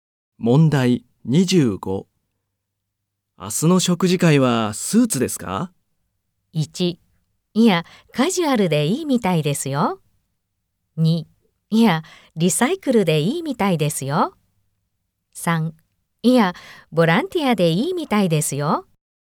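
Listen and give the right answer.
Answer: 1: いや、カジュアルでいいみたいですよ。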